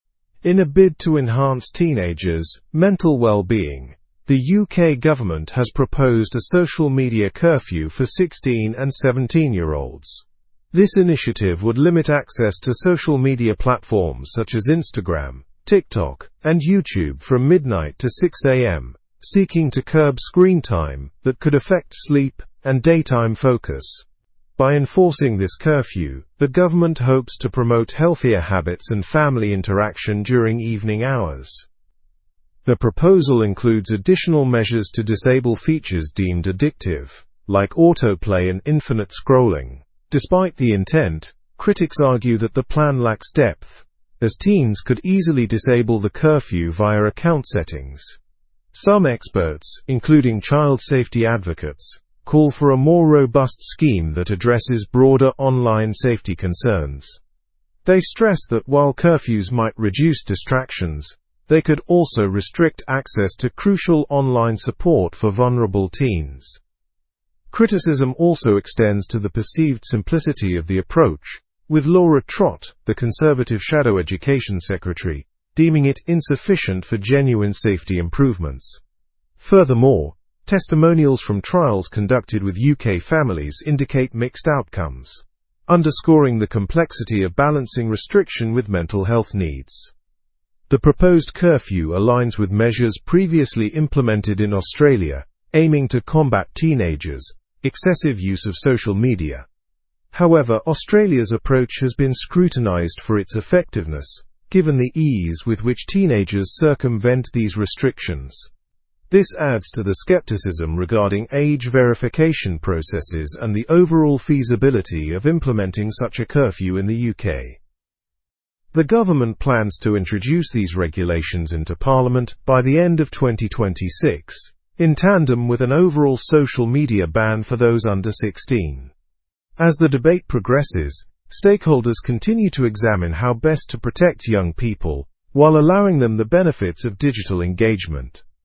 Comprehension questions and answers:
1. What is the main objective of the UK's proposed social media curfew?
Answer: Enhancing teenagers' mental well-being.

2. Which age group is targeted by this curfew?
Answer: 16 and 17-year-olds.

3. During what hours would the social media access be limited?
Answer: From midnight to 6 am.

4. What are critics concerned about regarding the plan?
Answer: Critics argue that the plan lacks depth, and it's easy for teens to disable the settings.

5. Who is Laura Trott, and what is her view on the proposal?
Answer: Laura Trott is the Conservative shadow education secretary, and she sees the proposal as insufficient.

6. Which country's approach does the UK's proposal align with?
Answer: Australia's approach.

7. When does the government plan to introduce the new regulations?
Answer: By the end of 2026.

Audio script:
In a bid to enhance teenagers' mental well-being, the UK government has proposed a social media curfew for 16 and 17-year-olds. This initiative would limit access to social media platforms such as Instagram, TikTok, and YouTube from midnight to 6 am, seeking to curb screen time that could affect sleep and daytime focus. By enforcing this curfew, the government hopes to promote healthier habits and family interaction during evening hours.
The proposal includes additional measures to disable features deemed addictive, like auto-play and infinite scrolling. Despite the intent, critics argue that the plan lacks depth, as teens could easily disable the curfew via account settings. Some experts, including child safety advocates, call for a more robust scheme that addresses broader online safety concerns. They stress that while curfews might reduce distractions, they could also restrict access to crucial online support for vulnerable teens.
Criticism also extends to the perceived simplicity of the approach, with Laura Trott, the Conservative shadow education secretary, deeming it insufficient for genuine safety improvements. Furthermore, testimonials from trials conducted with UK families indicate mixed outcomes, underscoring the complexity of balancing restriction with mental health needs.
The proposed curfew aligns with measures previously implemented in Australia, aiming to combat teenagers' excessive use of social media. However, Australia's approach has been scrutinized for its effectiveness, given the ease with which teenagers circumvent these restrictions. This adds to the skepticism regarding age verification processes and the overall feasibility of implementing such a curfew in the UK.
The government plans to introduce these regulations into Parliament by the end of 2026, in tandem with an overall social media ban for those under 16. As the debate progresses, stakeholders continue to examine how best to protect young people while allowing them the benefits of digital engagement.

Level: Level 4